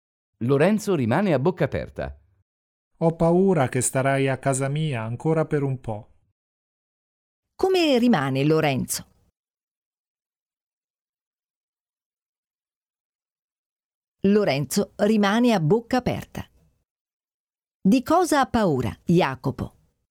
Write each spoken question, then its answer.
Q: Di cosa ha paura, Jacopo?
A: Jacopo ha paura che starà a casa sua ancora per un po'.